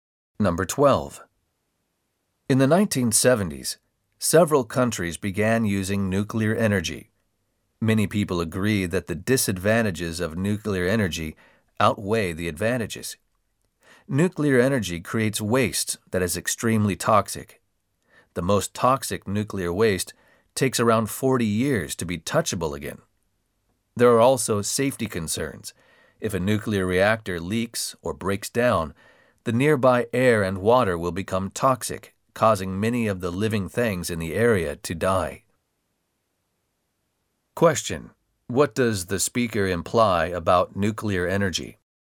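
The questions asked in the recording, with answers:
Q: What does the speaker imply about nuclear energy?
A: Its disadvantages outweigh its advantages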